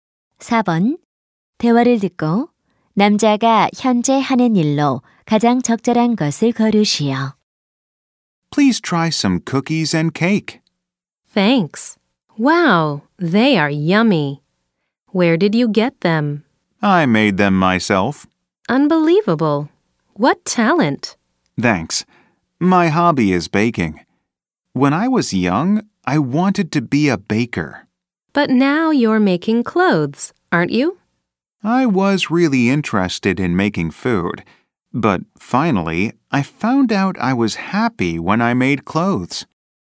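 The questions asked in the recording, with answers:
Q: 대화를 듣고 남자가 현재 하는 일로 가장 적절한 것을 고르시오.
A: 옷 만들기 (의상 디자이너)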